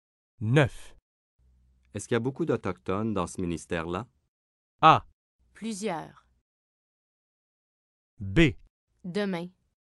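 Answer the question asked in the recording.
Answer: A: Plusieurs.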